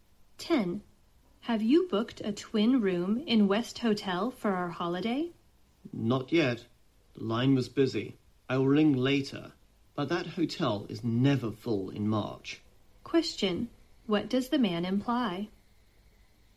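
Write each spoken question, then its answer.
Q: What does the man imply?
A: There's no need to worry about booking the hotel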